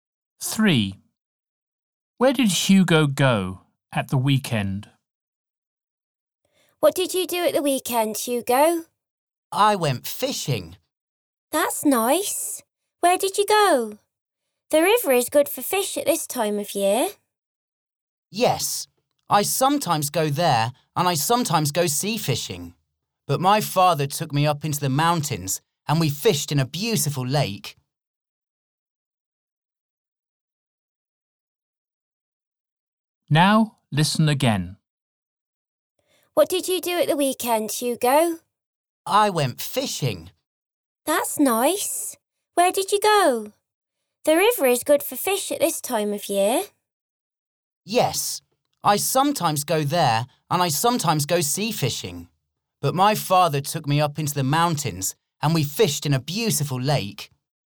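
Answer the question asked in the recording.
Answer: to a lake in the mountains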